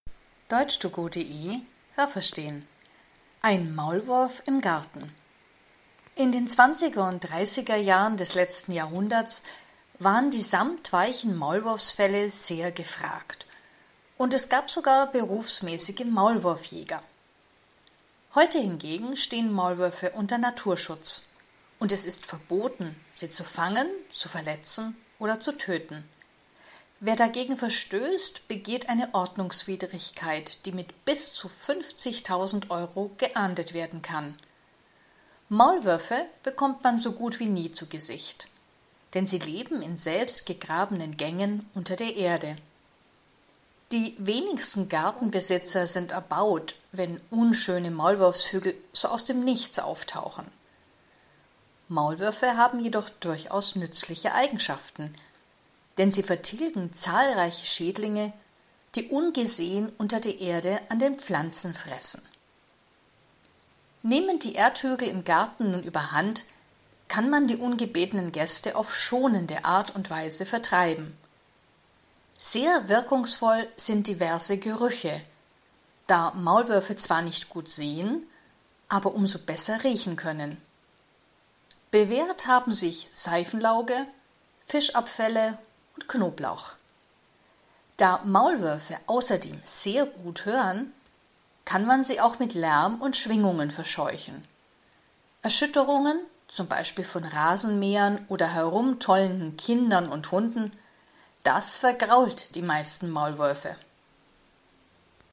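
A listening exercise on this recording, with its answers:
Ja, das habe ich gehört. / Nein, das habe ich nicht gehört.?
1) In den Zwanziger- und Dreißigerjahren des vorletzten Jahrhunderts waren Maulwurffelle sehr begehrt.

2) Wenn man heute einen Maulwurf tötet, kann es passieren, dass man bis zu 50.000 Euro Strafe bezahlen muss.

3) Man sieht Maulwürfe fast nie, weil sie unter der Erde leben.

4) Nur wenige Gartenbesitzer nehmen die Erde der Maulwurfshügel, um etwas zu bauen.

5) Maulwürfe fressen unter der Erde an einigen Pflanzen.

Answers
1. Nein, das habe ich nicht gehört.
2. Ja, das habe ich gehört.
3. Ja, das habe ich gehört.
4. Nein, das habe ich nicht gehört.
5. Nein, das habe ich nicht gehört.

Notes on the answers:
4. Die wenigsten Gartenbesitzer sind erbaut (d.h. begeistert), wenn sie Maulwurfshügel im Garten haben. Ob sie mit der Erde etwas bauen, darüber sagt der Text nichts.
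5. Sie vertilgen Schädlinge, die unter der Erde an Pflanzen fressen.

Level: C2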